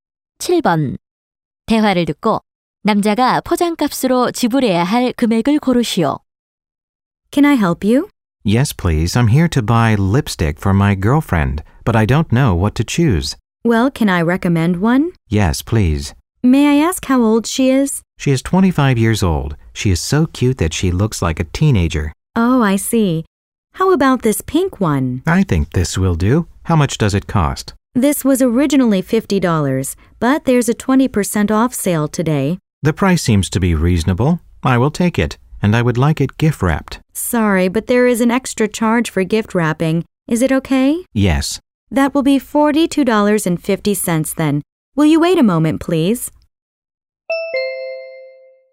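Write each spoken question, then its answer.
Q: 대화를 듣고 남자가 포장값으로 지불해야 할 금액을 고르시오.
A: 2.50달러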